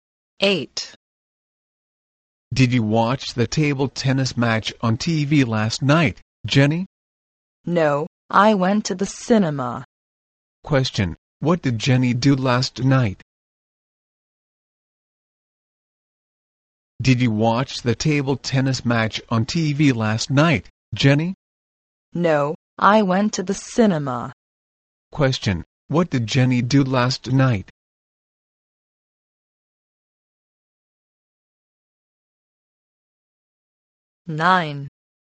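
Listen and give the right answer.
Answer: She went to the cinema.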